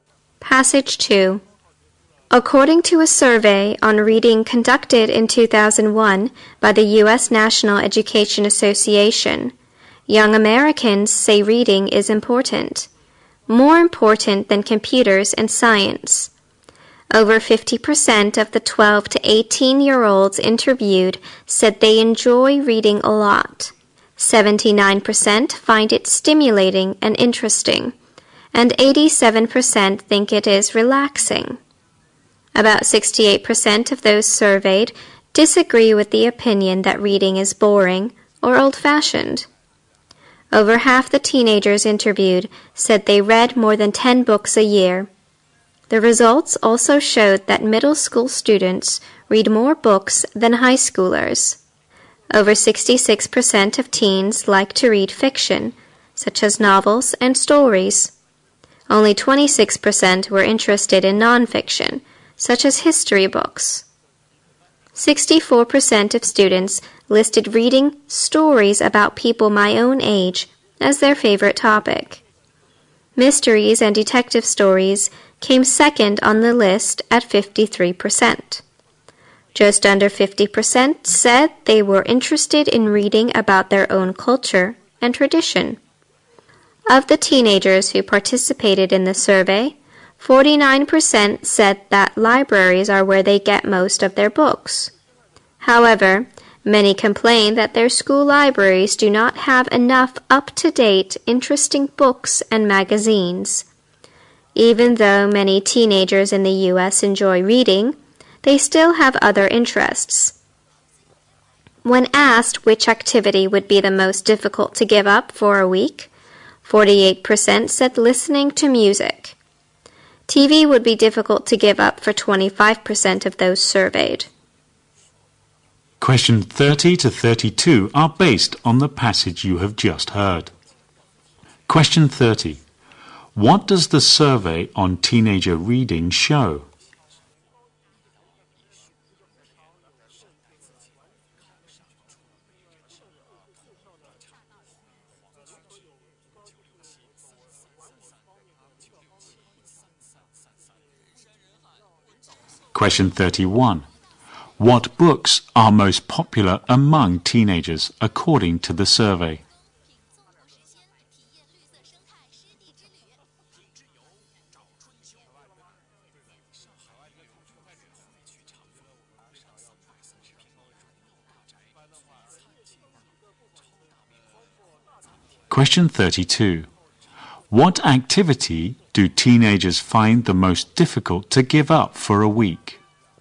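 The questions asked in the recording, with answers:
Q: What does the survey on teenager reading show?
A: Young Americans think reading is important and enjoy it.

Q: What books are most popular among teenagers according to the survey?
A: Fiction, especially stories about people their own age

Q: What activity do teenagers find the most difficult to give up for a week?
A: Listening to music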